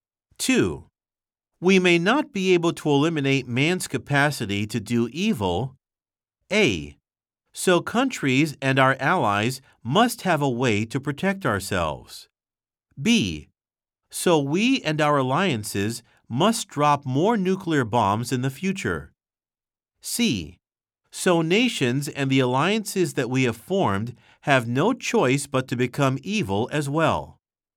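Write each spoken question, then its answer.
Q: We may not be able to eliminate man's capacity to do evil.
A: A: So countries and our allies must have a way to protect ourselves.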